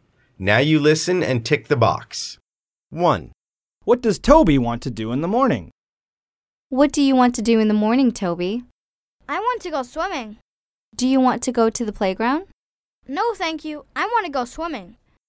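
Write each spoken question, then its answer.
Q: What does Toby want to do in the morning?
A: go swimming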